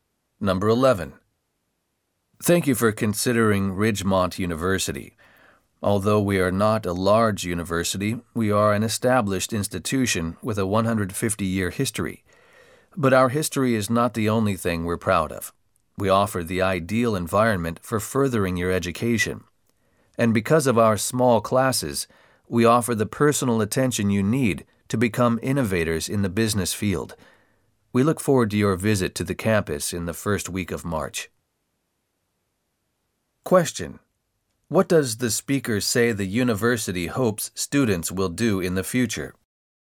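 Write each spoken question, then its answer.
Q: What does the speaker say the university hopes students will do in the future?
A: Become innovators in the business field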